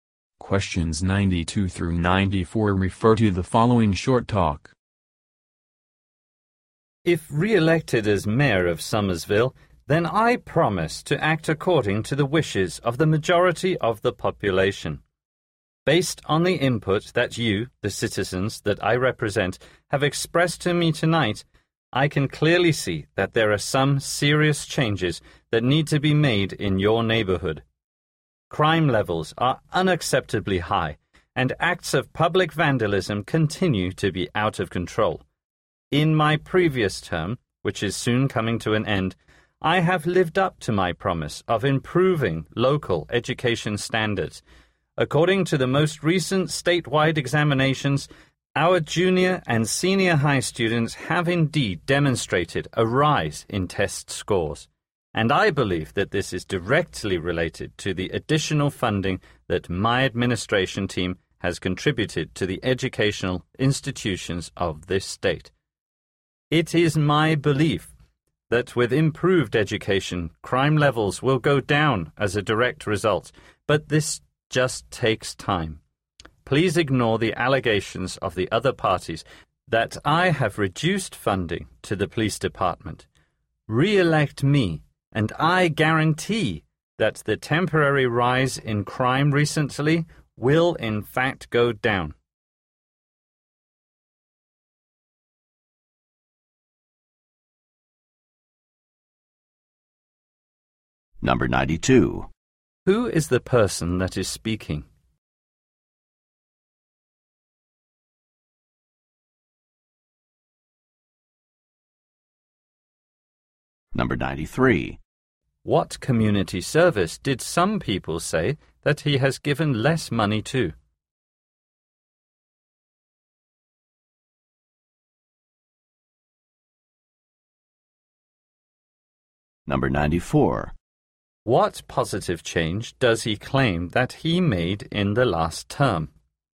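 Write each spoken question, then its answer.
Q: Who is the person that is speaking?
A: The mayor of Somersville

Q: What community service did some people say that he has given less money to?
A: The police department

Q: What positive change does he claim that he made in the last term?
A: Improved local education standards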